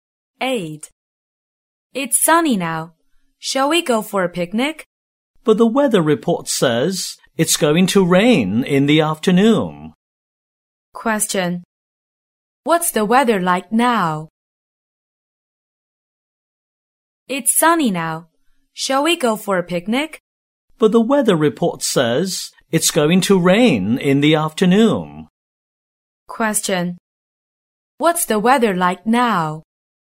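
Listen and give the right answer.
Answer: Sunny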